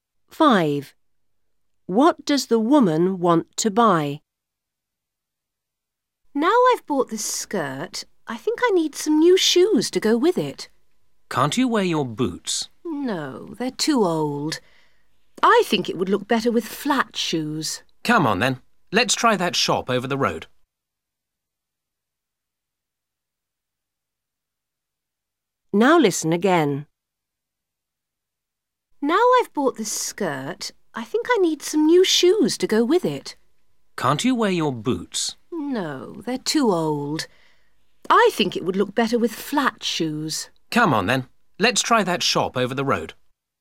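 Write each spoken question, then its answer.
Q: What does the woman want to buy?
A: Flat shoes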